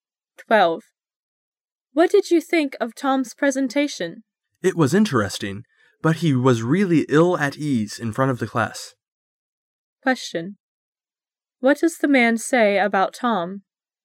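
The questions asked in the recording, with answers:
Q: What does the man say about Tom?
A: Tom was nervous in front of the class.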